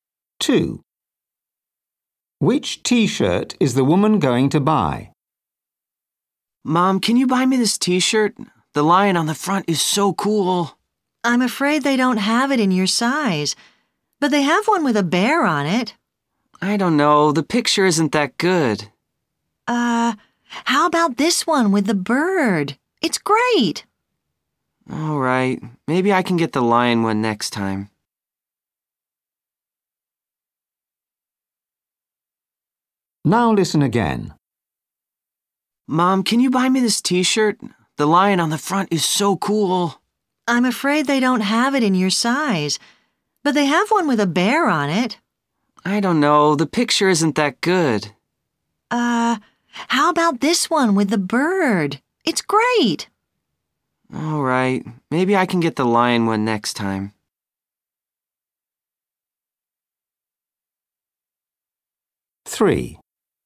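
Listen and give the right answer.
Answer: the one with the bird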